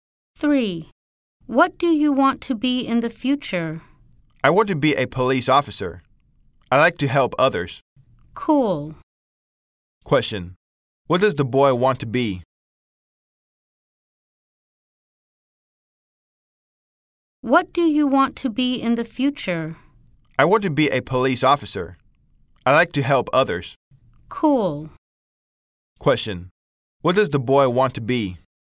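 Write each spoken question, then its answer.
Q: What does the boy want to be?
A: A police officer.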